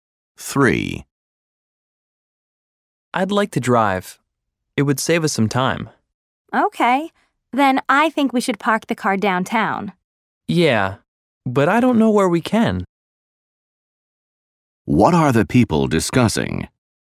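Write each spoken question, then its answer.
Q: What are the people discussing?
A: Where to park the car downtown.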